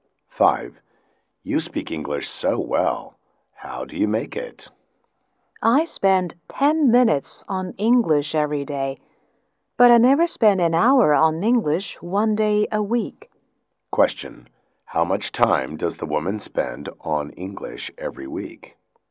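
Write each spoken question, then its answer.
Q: How much time does the woman spend on English every week?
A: 70 minutes.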